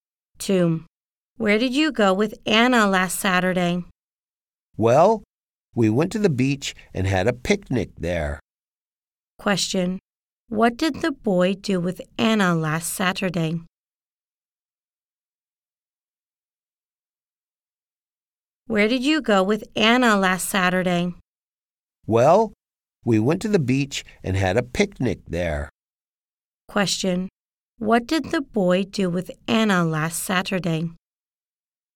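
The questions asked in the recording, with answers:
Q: What did the boy do with Anna last Saturday?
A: They went to the beach and had a picnic.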